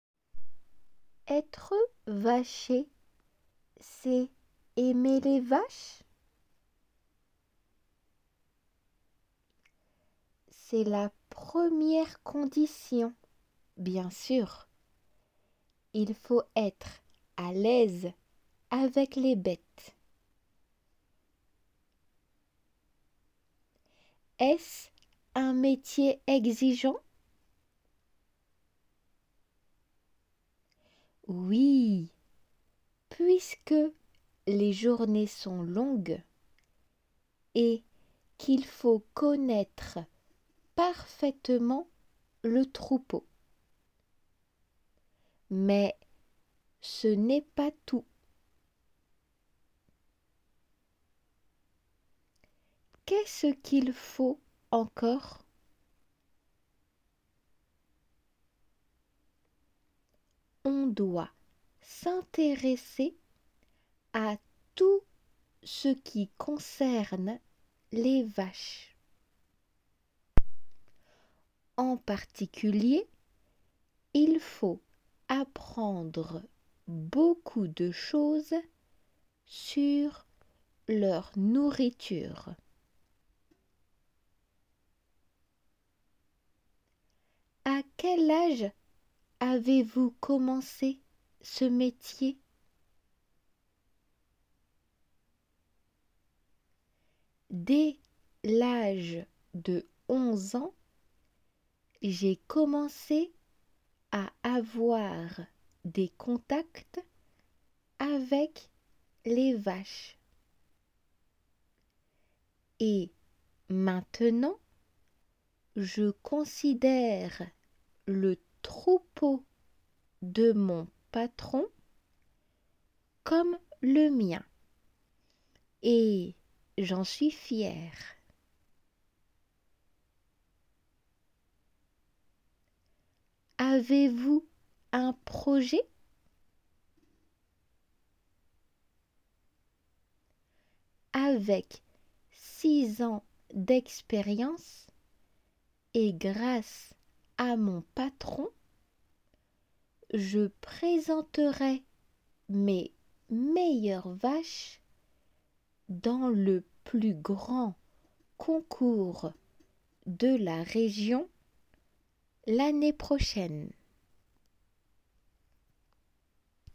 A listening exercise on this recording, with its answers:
( ) 内に語句を書き入れます。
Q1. C'est d'être à l'( ) avec les vaches.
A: aise

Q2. Pace que les ( ) sont longues et qu'on doit bien ( ) le troupeau.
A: journées , connaiître

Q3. Il faut ( ) beaucoup de choses sur la ( ) des vaches.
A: apprendre, nourriture

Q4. Il le considère comme le ( ) .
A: sien

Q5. Il ( ) ses meilleures vaches dans le plus grand ( ) de la région.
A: présentra, concours

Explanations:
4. 聞き取り用の音声の中では je considére le troupeau de mon patoron comme le mienとなっているが 問題文中ではil le considére comme le sienとする。
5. Il ( ) ses meilleures vaches ~~となっているので ilを主語とする il présentera とする

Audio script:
La journaliste : Être vacher, c'est aimer les vaches ?
Xavier : C'est la première condition, bien sûr ! Il faut être à l'aise avec les bêtes.
La journaliste : Est-ce un métier exigeant ?
Xavier : Oui, puisque les journées sont longues et qu'il faut connaître parfaitement le troupeau.
Mais ce n'est pas tout.
La journaliste : Qu'est-ce qu'il faut encore ?
Xavier : On doit s'intéresser à tout ce qui concerne les vaches. En particulier il faut apprendre beaucoup de choses sur leur nourriture.
La journaliste : A quel âge avez-vous commencé ce métier ?
Xavier : Dès l'âge de 11 ans j'ai commencé à avoir des contacts avec les vaches.
Et maintenant je considère le troupeau de mon patron comme le mien et j'en suis fier.
La journaliste : Avez-vous un projet ?
Xavier : Avec six ans d'expérience et grâce à mon patron, je présenterai mes meilleures vaches dans le plus grand concours de la région l'année prochaine.

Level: 仏検2級